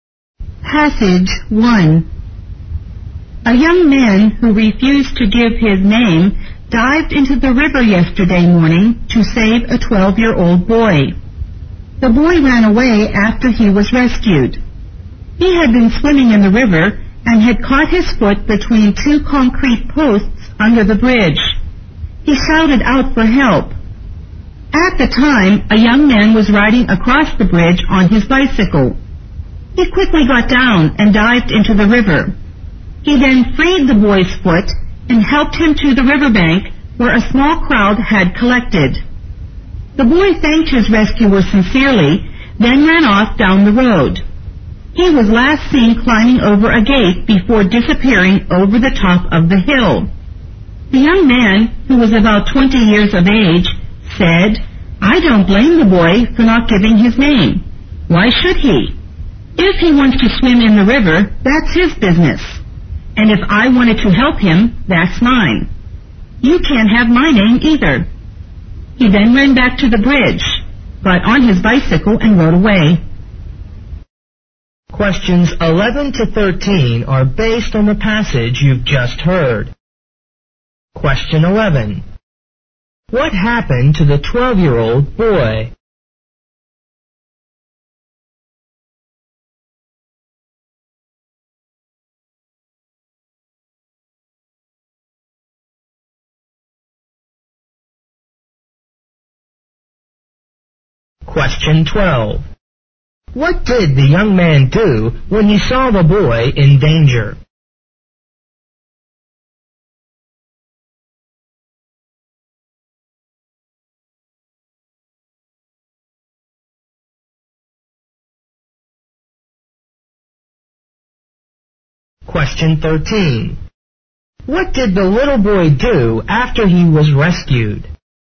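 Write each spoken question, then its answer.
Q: What happened to the 12-year-old boy?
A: His foot got caught between two concrete posts under the bridge while he was swimming

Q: What did the young man do when he saw the boy in danger?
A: He got off his bicycle and dived into the river to save him

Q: What did the little boy do after he was rescued?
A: He thanked his rescuer and ran away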